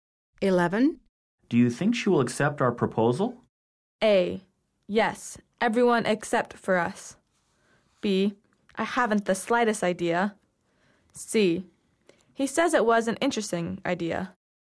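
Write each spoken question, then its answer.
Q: Do you think she will accept our proposal?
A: B: I haven't the slightest idea.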